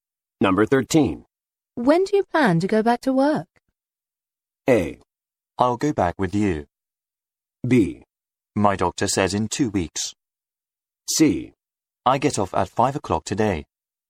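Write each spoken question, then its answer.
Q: When do you plan to go back to work?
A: B: My doctor says in 2 weeks.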